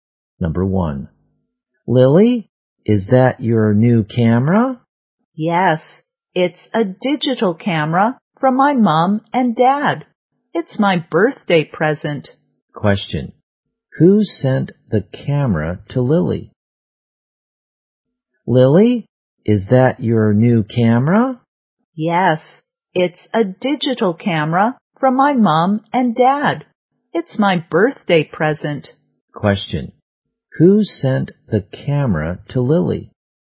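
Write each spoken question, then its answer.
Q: Who sent the camera to Lily?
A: Her mom and dad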